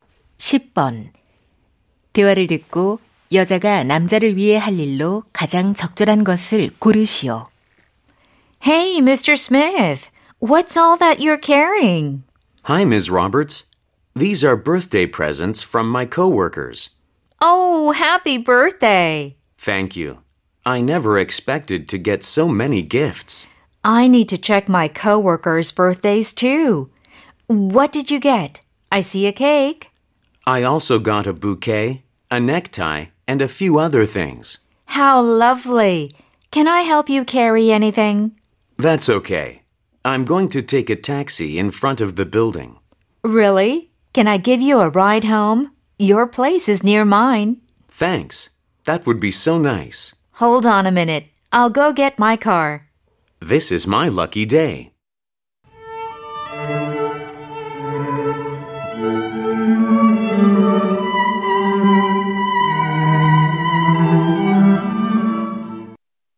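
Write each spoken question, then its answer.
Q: 대화를 듣고 여자가 남자를 위해 할 일로 가장 적절한 것을 고르시오.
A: 차로 집까지 태워다 주기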